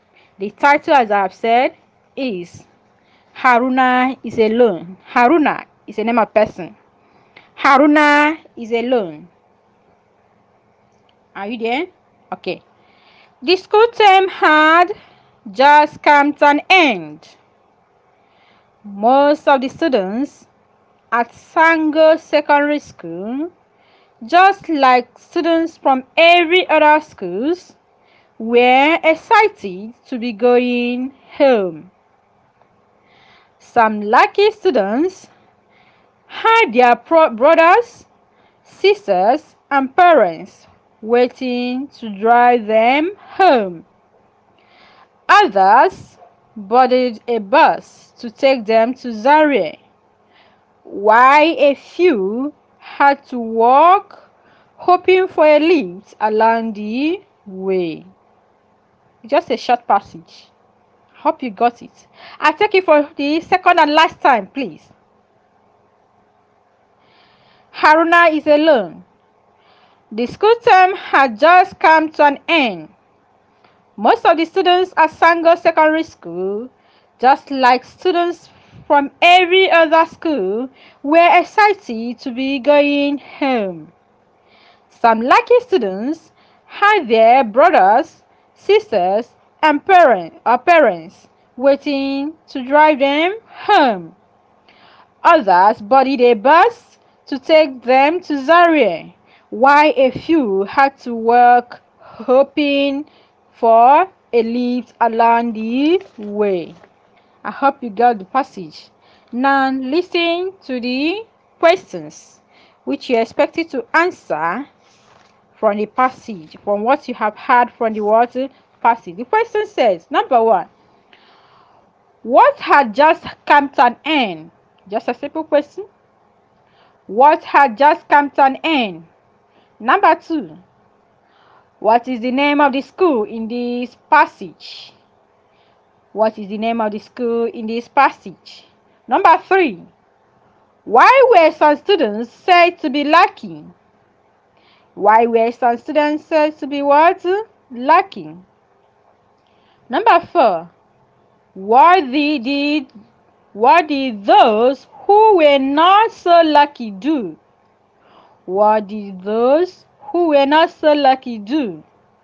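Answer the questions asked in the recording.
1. The school term
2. Sango Secondary School
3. Their brothers, sisters and parents were waiting to drive them home
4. Some boarded a bus to Zaria, while a few walked, hoping for a lift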